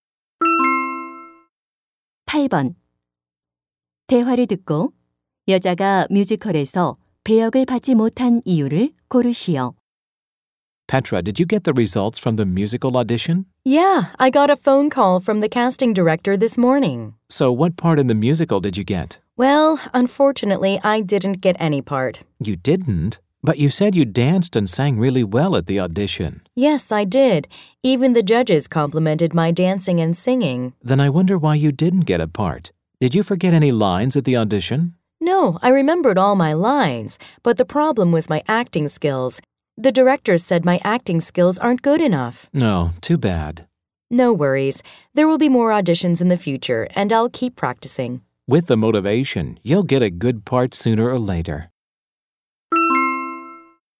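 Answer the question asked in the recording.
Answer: 연기 실력이 부족해서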